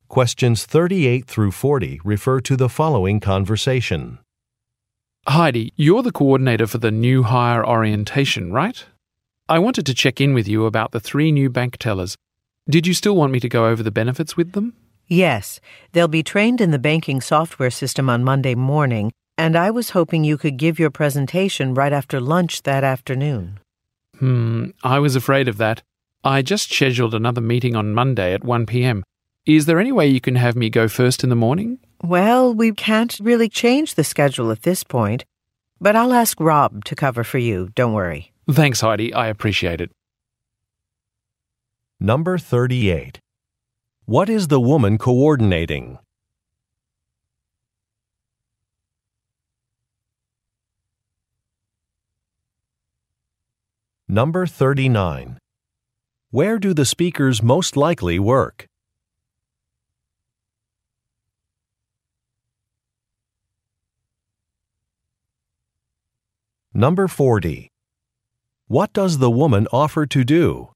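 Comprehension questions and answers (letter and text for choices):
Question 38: What is the woman coordinating?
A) A company banquet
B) A grand opening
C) A new-hire orientation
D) A yearly budget meeting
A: C) A new-hire orientation

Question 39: Where do the speakers most likely work?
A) At an insurance company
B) At a department store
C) At a business school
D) At a bank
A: D) At a bank

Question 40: What does the woman offer to do?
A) Find another presenter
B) Confirm an order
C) Book a venue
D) Prepare a contract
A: A) Find another presenter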